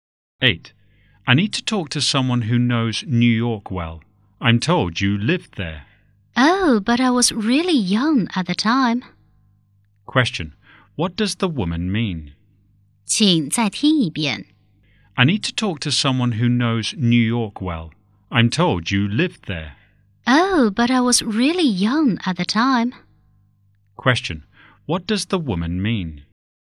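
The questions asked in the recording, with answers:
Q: Question. What does the woman mean?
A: She doesn't know New York well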